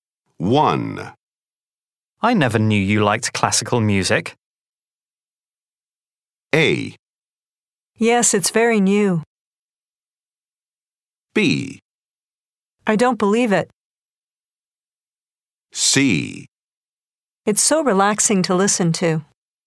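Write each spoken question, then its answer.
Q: I never knew you liked classical music.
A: C: It's so relaxing to listen to.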